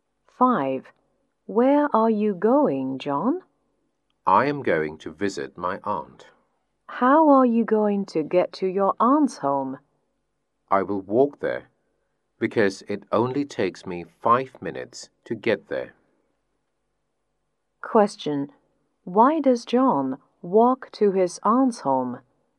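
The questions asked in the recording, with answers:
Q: Why does John walk to his aunt's home?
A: Because it only takes him 5 minutes to get there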